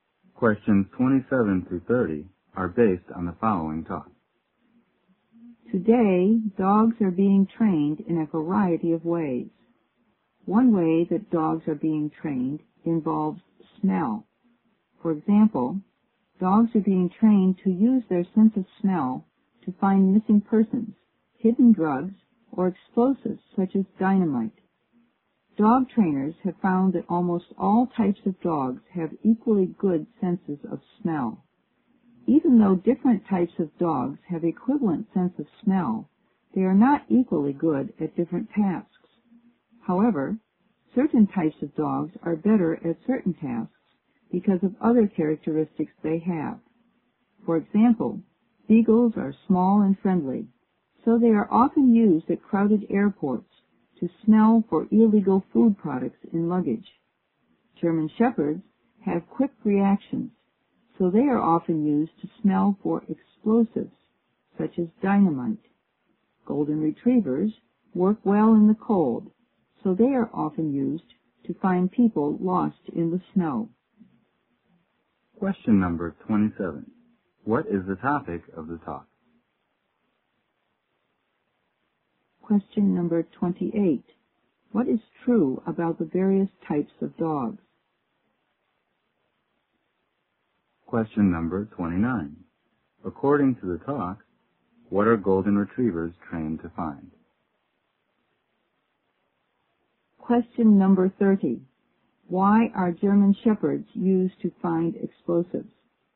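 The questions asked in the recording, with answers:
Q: What is the topic of the talk?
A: Training dogs to use their sense of smell

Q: What is true about the various types of dogs?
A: They have equally good senses of smell but are good at different tasks

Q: According to the talk, what are golden retrievers trained to find?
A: People lost in the snow

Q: Why are German shepherds used to find explosives?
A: They have quick reactions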